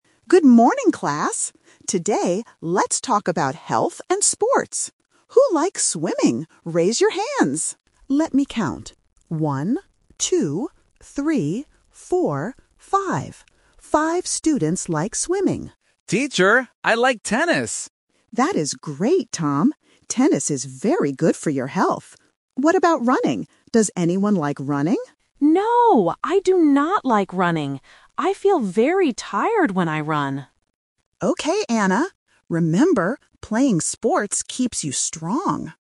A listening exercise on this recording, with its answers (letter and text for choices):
Listen to the conversation in a classroom. Circle the correct answer (A, B, or C).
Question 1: How many students like swimming?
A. Four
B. Five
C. Ten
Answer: B. Five

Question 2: Which sport does Tom spell out?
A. Tennis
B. Swimming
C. Running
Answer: A. Tennis

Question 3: Why does Anna NOT like running?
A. Because she feels hot.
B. Because she feels cold.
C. Because she feels tired.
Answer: C. Because she feels tired.

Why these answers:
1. The teacher counts the students and repeats the final number: "Five. Five students like swimming." Option A (Four) is a trap because the teacher says "four" while counting. Option C (Ten) is a phonetic trap because "Ten" and "Tennis" (mentioned right after) sound similar to beginners.
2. Tom says "I like tennis!". Option B (Swimming) and Option C (Running) are traps because they are mentioned in the audio, but Tom does not spell them.
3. Anna explicitly says, "I feel very tired when I run." Options A (hot) and B (cold) are plausible words related to health and exercise, but they are not mentioned by Anna in the audio.

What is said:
Teacher: Good morning, class. Today, let's talk about health and sports. Who likes swimming? Raise your hands!
Teacher: Let me count. Five students like swimming.
Tom: Teacher, I like tennis!
Teacher: That is great, Tom. Tennis is very good for your health. What about running? Does anyone like running?
Anna: No! I do not like running. I feel very tired when I run.

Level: A1